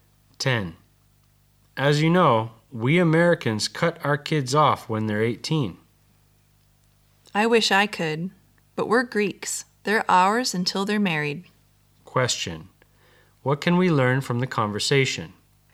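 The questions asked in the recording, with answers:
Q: What can we learn from the conversation?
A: Greek parents support their children until they marry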